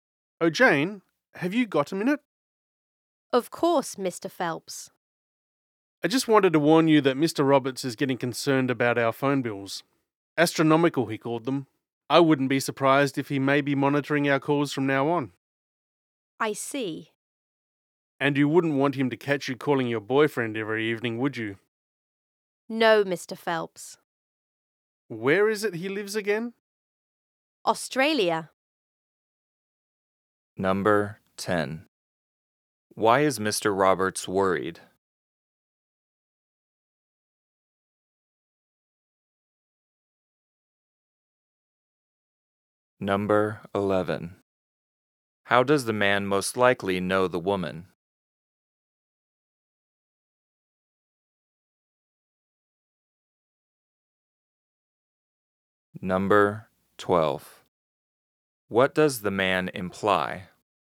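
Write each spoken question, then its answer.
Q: Why is Mr. Roberts worried?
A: The phone bills are very high

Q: What does the man imply?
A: Jane has been making expensive calls to her boyfriend in Australia at work and should stop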